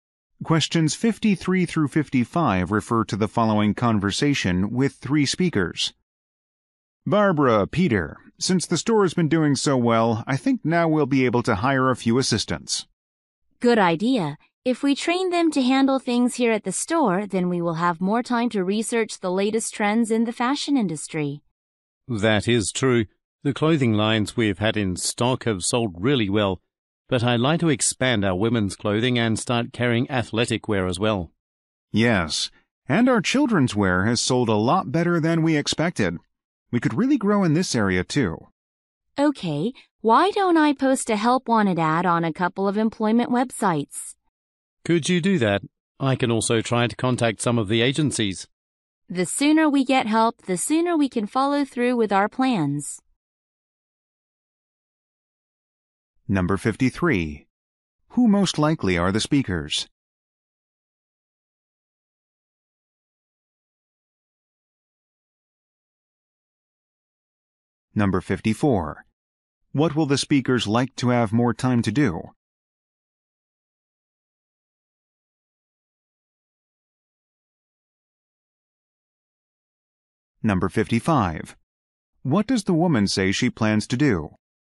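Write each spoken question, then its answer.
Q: Who most likely are the speakers?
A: Clothing store owners

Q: What will the speakers like to have more time to do?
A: Research the latest fashion trends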